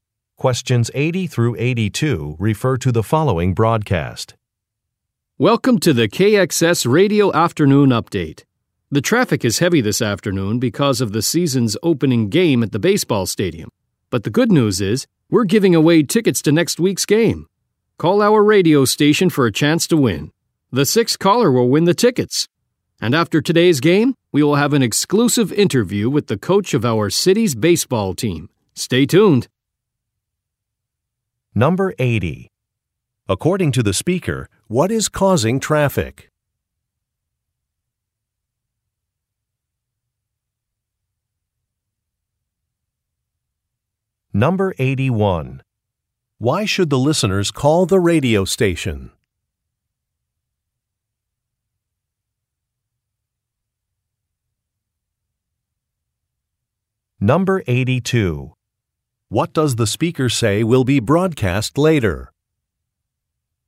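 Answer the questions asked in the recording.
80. The season's opening baseball game
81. For a chance to win tickets to next week's game
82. An exclusive interview with the coach of the city's baseball team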